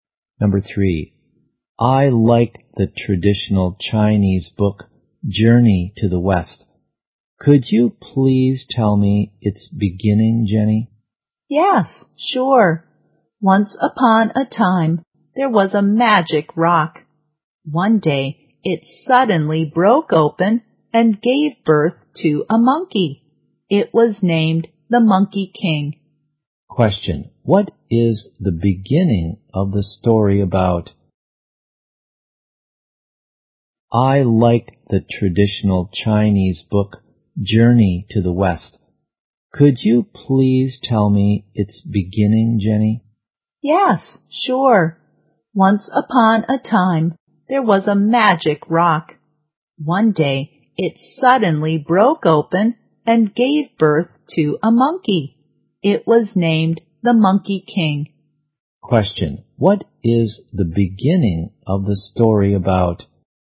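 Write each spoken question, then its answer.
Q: what is the beginning of the story about?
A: A magic rock broke open and gave birth to a monkey (the Monkey King).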